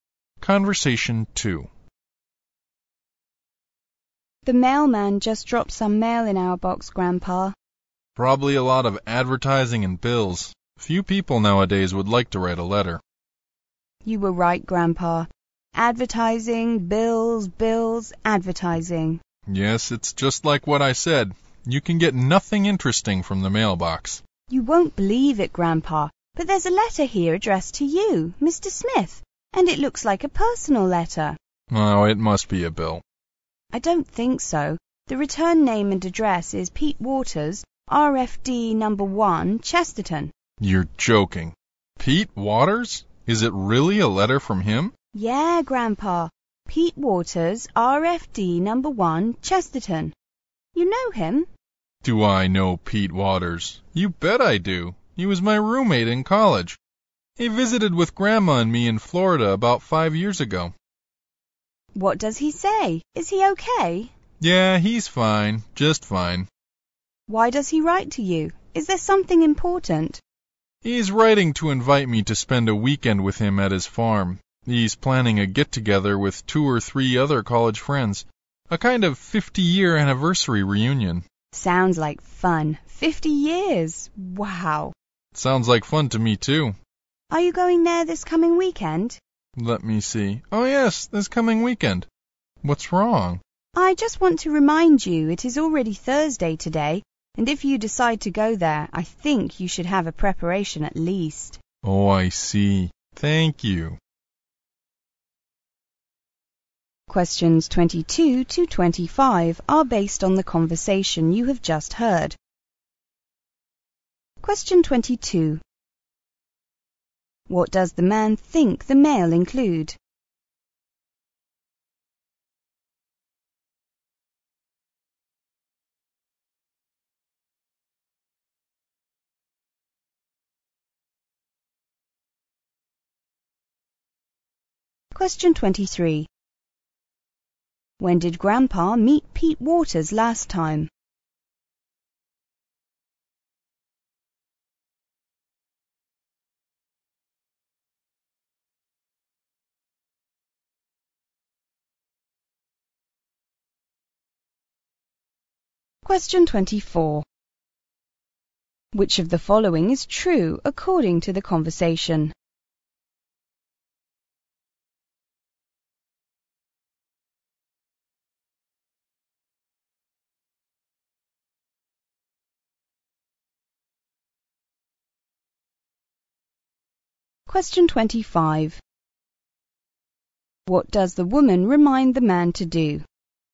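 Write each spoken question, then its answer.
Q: What does the man think the mail include?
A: Advertising and bills

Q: When did Grandpa meet Pete Waters last time?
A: About five years ago, in Florida

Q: What does the woman remind the man to do?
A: Get ready for the trip, since it's already Thursday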